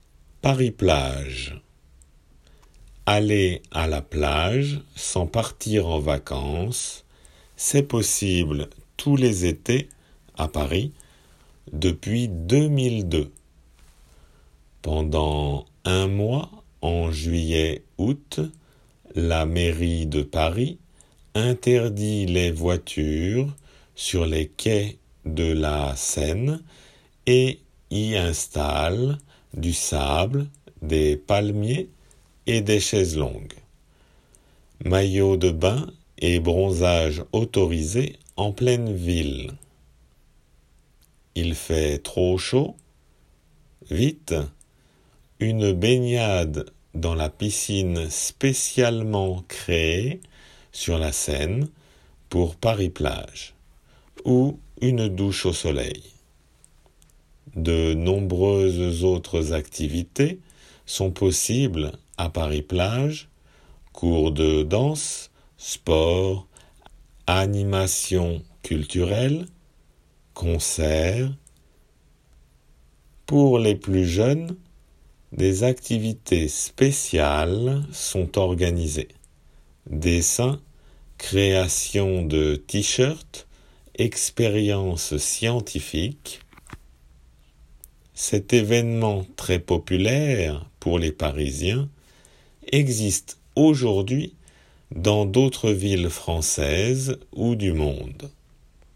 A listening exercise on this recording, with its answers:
Écoutez bien et indiquez si les phrases suivantes sont vraies ou fausses.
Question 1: Aller à la plage, c'est possible tous les étés, à Paris.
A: 〇

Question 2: 少年少女向きには特別行事が組まれている。 お絵かき T-シャツづくり。又様々の化学実験遊び。等。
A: 〇

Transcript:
Aller à la plage sans partir en vacances, c'est possible tous les étés, à Paris, depuis 2002 !
Pendant un mois, en juillet-août, la mairie de Paris interdit les voitures sur les quais de la Seine et y installe du sable, des palmiers et des chaises longues : maillots de bain et bronzage autorisés en pleine ville !
Il fait trop chaud ? Vite ! Une baignade dans la piscine spécialement
créée sur la Seine pour Paris Plages ou une douche au soleil.
De nombreuses autres activités sont possibles à Paris Plages : cours de dance, sports, animations culturelles, concerts...
Pour les plus jeunes, des activités spéciales sont organisées : dessin, création de tee-shirt, expériences scientifiques.
Cet événement très populaire pour les Parisiens existe aujoud'hui dans d'autres villes françaises ou du monde.